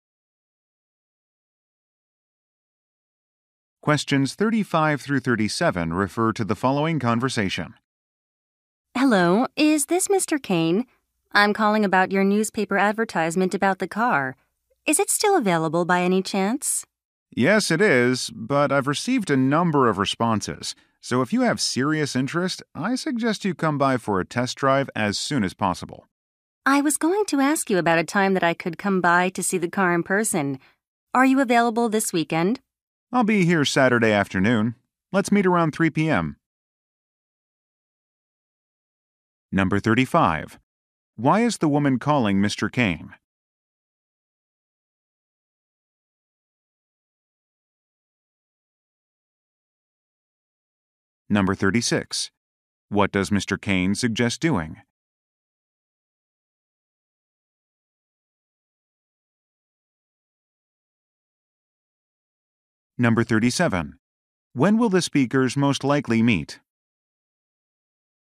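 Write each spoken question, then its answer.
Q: Why is the woman calling Mr. Kane?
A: To ask about a car he advertised in the newspaper

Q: What does Mr. Kane suggest doing?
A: Coming by for a test drive soon

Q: When will the speakers most likely meet?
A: Saturday at around 3 p.m.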